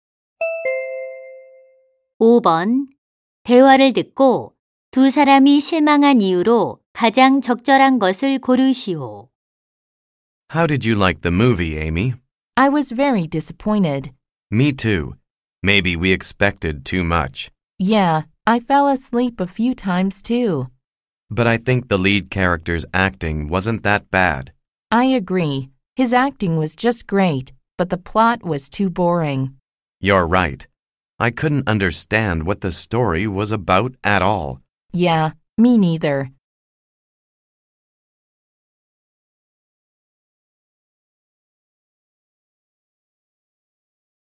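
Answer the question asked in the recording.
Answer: 줄거리가 너무 지루해서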